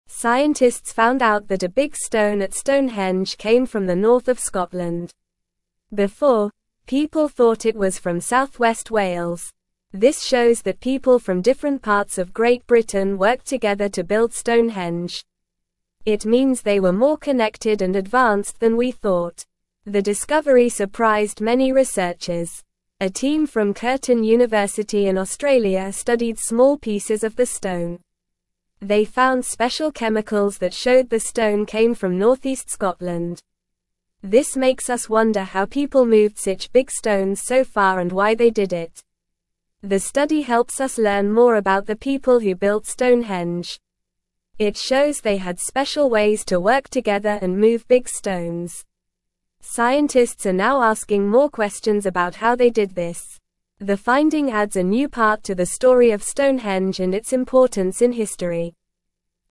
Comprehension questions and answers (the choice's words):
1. Where did scientists discover the big stone at Stonehenge came from?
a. South-west Wales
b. East of England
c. North of Scotland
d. West of Ireland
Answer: North of Scotland

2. What did the discovery of the stone's origin show about the people who built Stonehenge?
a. They were not very skilled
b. They were from different countries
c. They were not united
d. They were more connected and advanced than previously thought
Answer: They were more connected and advanced than previously thought

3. Which university's team studied the small pieces of the stone to find out where it came from?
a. Harvard University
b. Oxford University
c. Stanford University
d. Curtin University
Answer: Curtin University

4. What did the special chemicals found in the stone reveal about its origin?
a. It came from south-west Wales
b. It came from Australia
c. It came from north-east Scotland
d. It came from France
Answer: It came from north-east Scotland

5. What are scientists now wondering about how the people moved the big stones for Stonehenge?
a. How they did it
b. Why they did it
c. When they did it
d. Where they did it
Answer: How they did it

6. What does the study help us learn about the people who built Stonehenge?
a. They had special ways to work together and move big stones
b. They were not very smart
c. They worked alone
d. They were not important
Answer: They had special ways to work together and move big stones

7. What are scientists now doing after this discovery?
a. Ignoring the discovery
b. Asking more questions about how the people built Stonehenge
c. Forgetting about Stonehenge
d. Moving the stones again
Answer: Asking more questions about how the people built Stonehenge

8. What does the finding of the stone's origin add to the story of Stonehenge?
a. Nothing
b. A new part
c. Confusion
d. Sadness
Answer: A new part

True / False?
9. Scientists discovered that a big stone at Stonehenge actually came from north of Scotland, not south-west Wales as previously thought.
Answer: True

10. Scientists are now indifferent about how exactly the ancient builders transported the stones and why they went to such great lengths.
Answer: False

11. The discovery has shocked many people and raised questions about how ancient people transported such big stones over long distances.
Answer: False

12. The study provides little insight into the people who built Stonehenge and their unique ways of working together and moving large stones.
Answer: False

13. Researchers from Curtin University in Australia studied small pieces of the stone and found special chemicals indicating it came from north-east Scotland.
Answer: True

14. This finding suggests that people from different parts of Great Britain worked together to build Stonehenge, showing they were more connected and advanced than believed.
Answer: True

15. The finding undermines the advanced skills and cooperation of ancient people in creating monumental structures like Stonehenge.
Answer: False

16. This new information adds an interesting piece to the story of Stonehenge and its significance in history.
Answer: True

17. Scientists found out that a big stone at Stonehenge came from the (1)______ of (2)______.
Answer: north

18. Scientists found out that a big stone at Stonehenge came from the (1)______ of (2)______.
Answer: Scotland

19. Before, people thought it was from south-west (3)______.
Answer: Wales

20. It means they were more (4)______ and advanced than we thought.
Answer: connected

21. A team from Curtin University in Australia studied (5)______ pieces of the (6)______.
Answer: small

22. A team from Curtin University in Australia studied (5)______ pieces of the (6)______.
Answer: stone

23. They found special chemicals that showed the stone (7)______ from north-east Scotland.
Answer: came

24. This makes us wonder how people moved such big (8)______ so far and why they did it.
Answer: stones

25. The study helps us learn more about the people who (9)______ Stonehenge.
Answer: built

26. The (10)______ adds a new (11)______ to the story of Stonehenge and its (12)______ in history.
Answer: finding

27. The (10)______ adds a new (11)______ to the story of Stonehenge and its (12)______ in history.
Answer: part

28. The (10)______ adds a new (11)______ to the story of Stonehenge and its (12)______ in history.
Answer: importance

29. Where did scientists discover the big stone at Stonehenge actually came from?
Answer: Scientists discovered that the big stone at Stonehenge came from north-east Scotland.

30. Why were researchers surprised by this discovery?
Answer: Researchers were surprised because they used to think the stone came from south-west Wales, but it actually came from a different place far away.

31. What did the team from Curtin University in Australia find when they studied the stone?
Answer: The team found special chemicals in the stone that showed it came from north-east Scotland.

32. Why are scientists now asking more questions about how the big stones were moved?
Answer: Scientists are asking more questions because they want to know how the people moved such big stones from far away places to build Stonehenge.

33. How does this new discovery add to the story of Stonehenge?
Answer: This new discovery adds a new part to the story of Stonehenge by showing where one of the big stones actually came from, changing what we knew before.

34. What does the article say about the importance of Stonehenge in history?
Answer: The article says Stonehenge is important in history because it shows how people in the past worked together and had special ways to build something like Stonehenge.

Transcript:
Scientists found out that a big stone at Stonehenge came from the north of Scotland. Before, people thought it was from south-west Wales. This shows that people from different parts of Great Britain worked together to build Stonehenge. It means they were more connected and advanced than we thought.
The discovery surprised many researchers. A team from Curtin University in Australia studied small pieces of the stone. They found special chemicals that showed the stone came from north-east Scotland. This makes us wonder how people moved such big stones so far and why they did it.
The study helps us learn more about the people who built Stonehenge. It shows they had special ways to work together and move big stones. Scientists are now asking more questions about how they did this. The finding adds a new part to the story of Stonehenge and its importance in history.

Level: Level 2